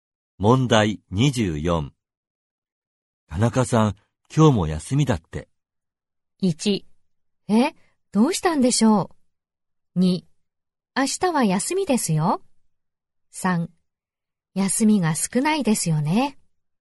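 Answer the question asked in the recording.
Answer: 1: え、どうしたんでしょう。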